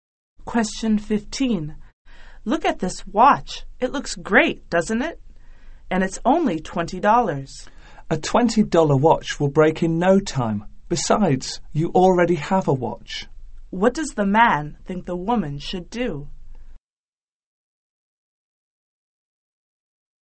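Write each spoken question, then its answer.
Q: What does the man think the woman should do?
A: Not buy the watch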